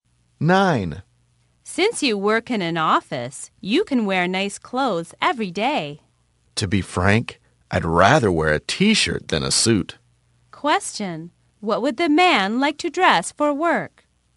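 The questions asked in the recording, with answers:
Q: what would the man like to dress for work?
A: A t-shirt rather than a suit.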